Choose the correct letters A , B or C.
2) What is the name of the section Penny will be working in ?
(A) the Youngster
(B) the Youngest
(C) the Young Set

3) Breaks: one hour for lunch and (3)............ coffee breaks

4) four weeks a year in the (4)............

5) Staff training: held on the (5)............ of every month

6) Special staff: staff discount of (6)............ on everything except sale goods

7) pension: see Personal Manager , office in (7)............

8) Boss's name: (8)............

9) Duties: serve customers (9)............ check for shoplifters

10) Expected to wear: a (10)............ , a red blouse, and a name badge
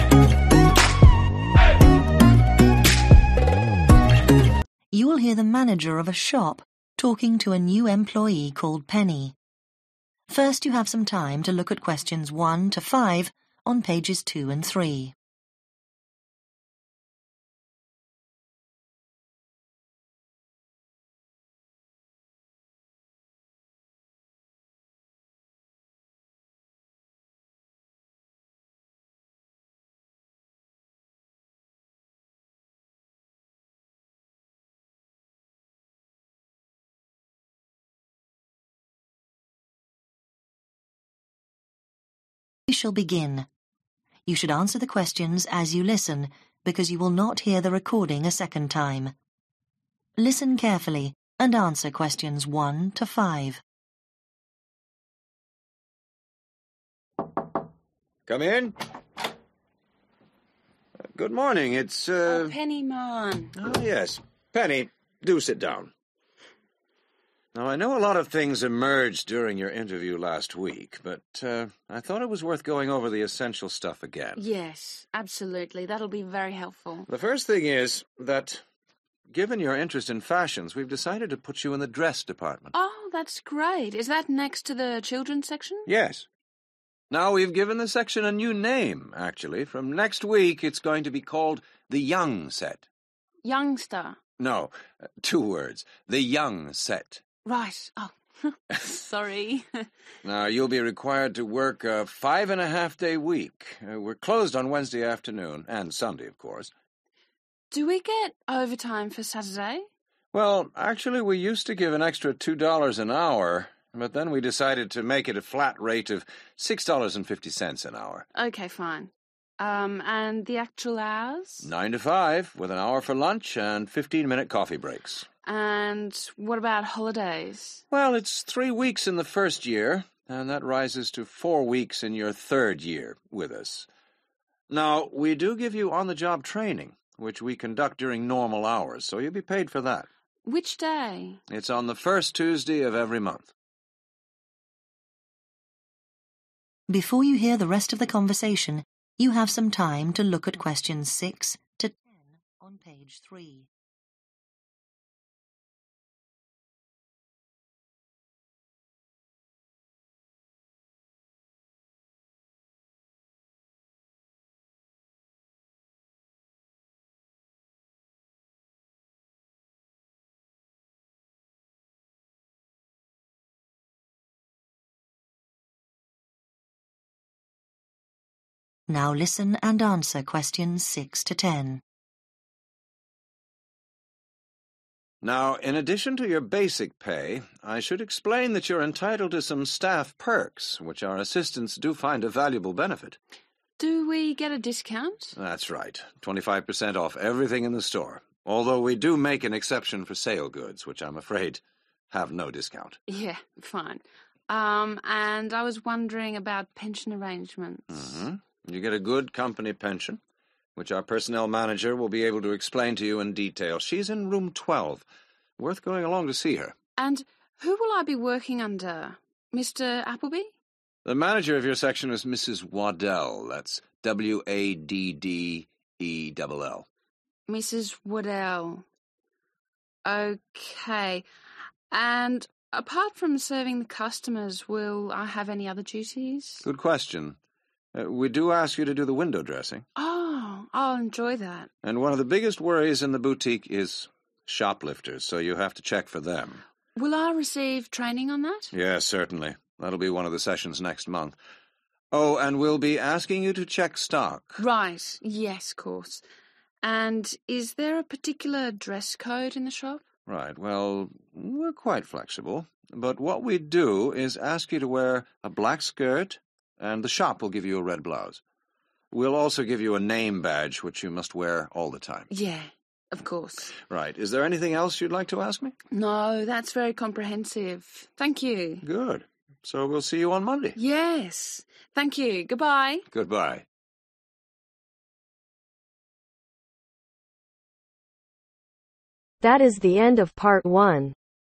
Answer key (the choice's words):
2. the Young Set
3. 15 minute
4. third/3rd year
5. first/1st Tuesday
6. 25%
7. room 12
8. (Mrs) Wad dell
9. window dressing / dress windows
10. black skirt